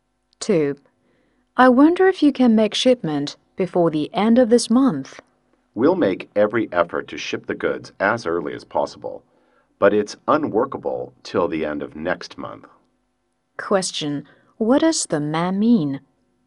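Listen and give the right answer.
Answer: Shipment is impossible before the end of this month; it can only be made by the end of next month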